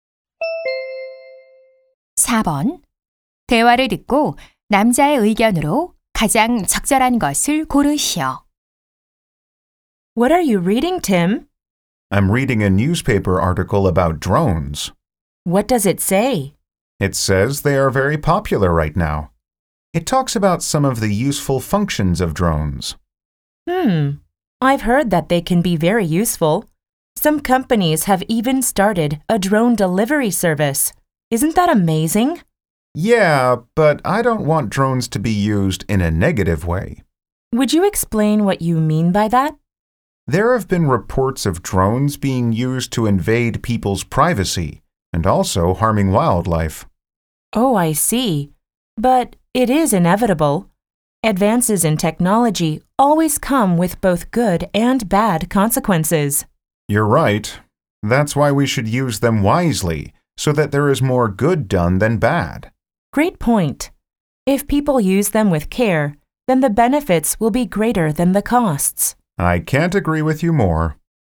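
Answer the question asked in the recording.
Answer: 드론은 신중하게 사용해야 한다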